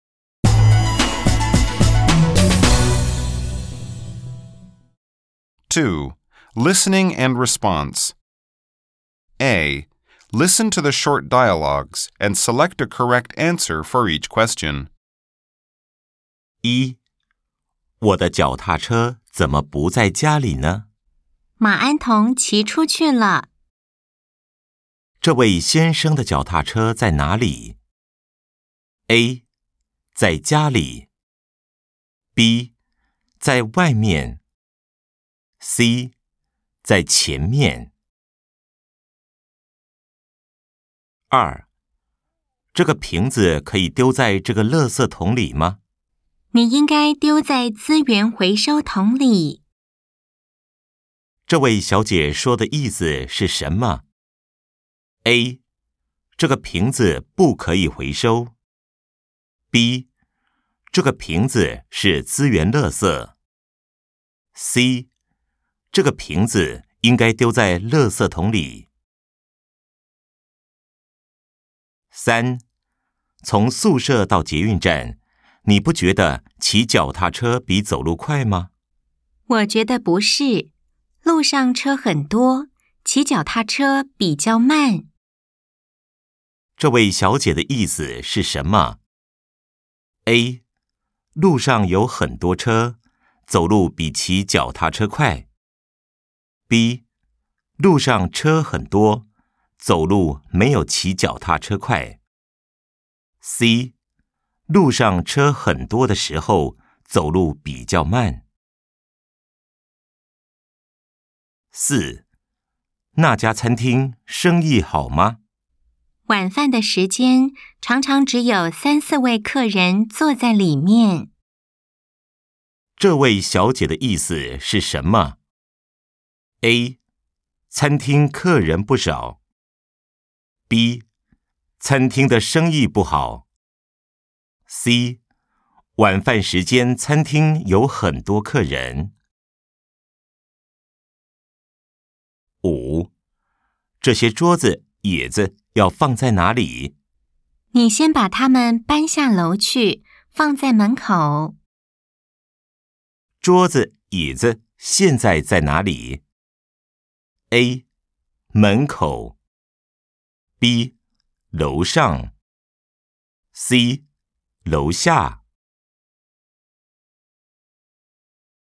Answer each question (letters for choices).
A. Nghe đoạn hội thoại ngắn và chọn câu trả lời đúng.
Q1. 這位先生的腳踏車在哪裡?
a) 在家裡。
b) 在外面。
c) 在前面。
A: b

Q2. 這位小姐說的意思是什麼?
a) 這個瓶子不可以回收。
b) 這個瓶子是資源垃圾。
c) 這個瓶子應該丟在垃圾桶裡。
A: b

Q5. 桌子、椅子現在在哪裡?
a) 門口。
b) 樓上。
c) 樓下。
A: a